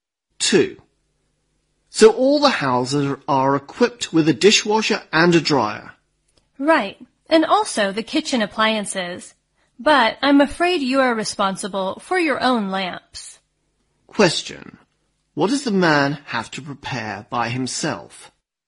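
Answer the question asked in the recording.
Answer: His own lamps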